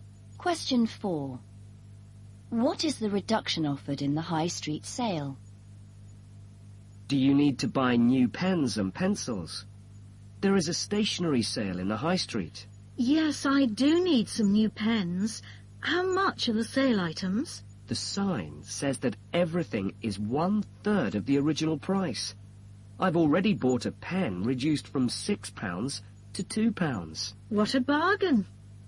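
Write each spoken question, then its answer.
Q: What is the reduction offered in the High Street sale?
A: Two-thirds off (items cost one-third of the original price)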